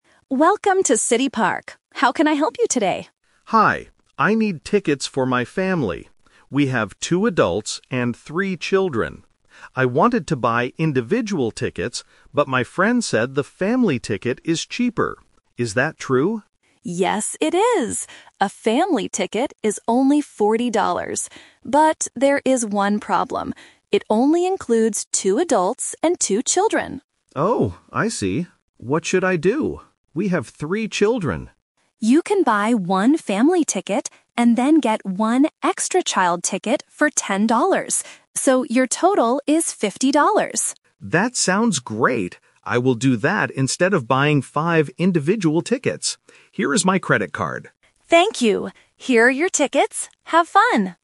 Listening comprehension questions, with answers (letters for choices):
Listen to the conversation at a ticket window. Choose the correct answer (A, B, or C) for each question.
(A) Two children.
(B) Three children.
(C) Five children.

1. How many children are in the customer's family?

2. How many children does one Family Ticket include?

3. What does the customer finally buy?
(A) Five individual tickets.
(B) One Family Ticket only.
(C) One Family Ticket and one extra child ticket.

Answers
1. B
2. A
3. C

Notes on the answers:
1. The customer clearly says at the beginning, "We have two adults and three children." Option (A) is a trap because that is the number of children the Family Ticket allows. Option (C) is a trap because five is the total number of people in the family (2 adults + 3 children).
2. The ticket agent explains the rule for the Family Ticket: "It only includes two adults and two children." Option (B) is the trap because it is the actual number of children the customer has.
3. This is "The Twist". The customer wanted to buy a Family Ticket for everyone, but because of the rule, they have to change the plan. The agent suggests buying "one Family Ticket, and then get one extra child ticket", and the customer agrees. Option (A) is a trap because the customer wanted to buy individual tickets at first but decided not to. Option (B) is a trap because it wouldn't be enough for the whole family.